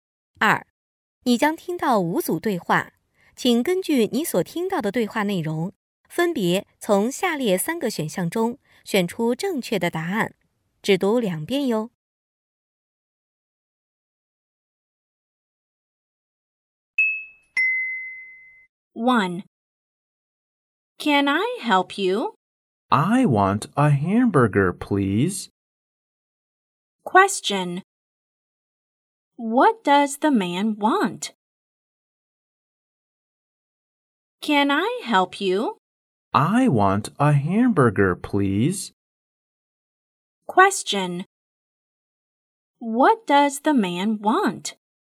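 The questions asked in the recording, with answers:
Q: What does the man want?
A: A hamburger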